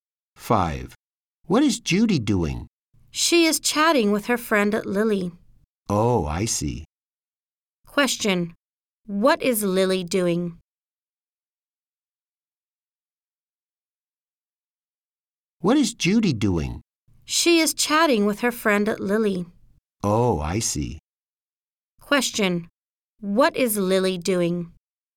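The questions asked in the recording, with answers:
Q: What is Lily doing?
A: Chatting with Judy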